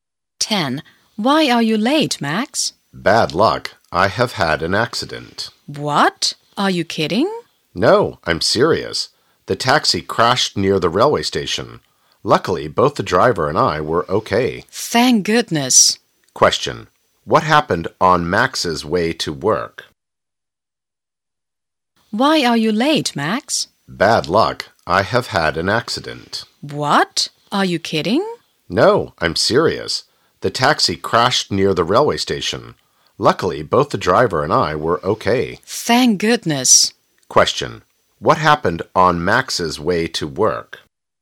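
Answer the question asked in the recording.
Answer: His taxi crashed near the railway station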